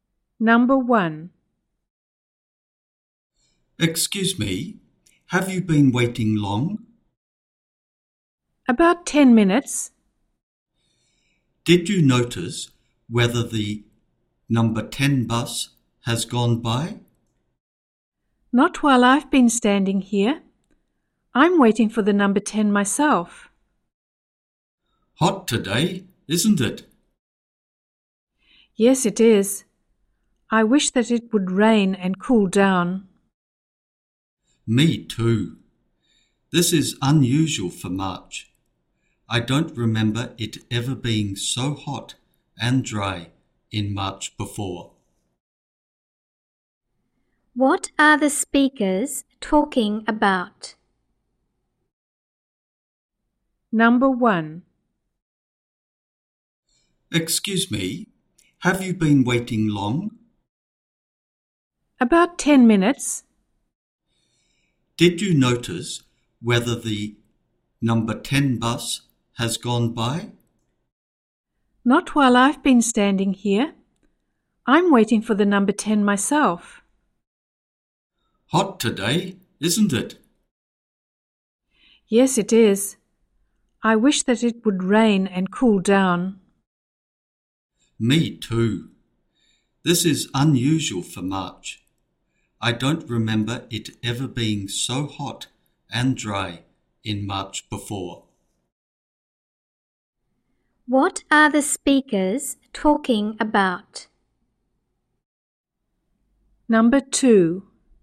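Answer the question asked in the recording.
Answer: The weather (unusually hot, dry day in March)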